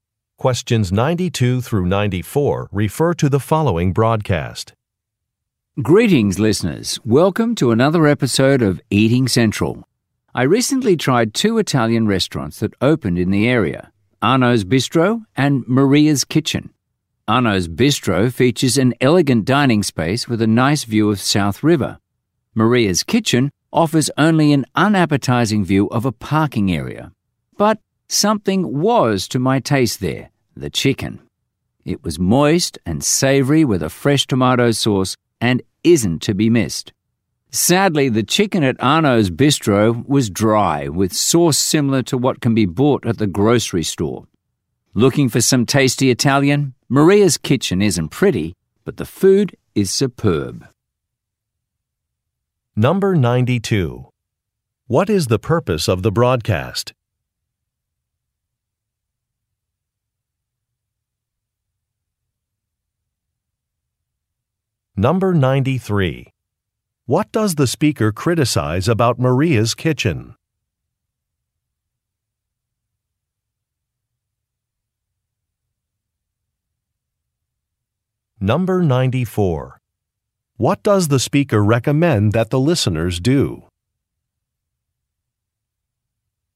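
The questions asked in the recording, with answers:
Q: What is the purpose of the broadcast?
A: To review restaurants

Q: What does the speaker criticize about Maria's Kitchen?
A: Its view

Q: What does the speaker recommend that the listeners do?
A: Eat at Maria's Kitchen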